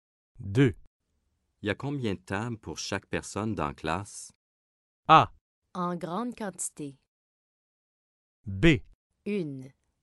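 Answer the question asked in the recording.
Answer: B: Une.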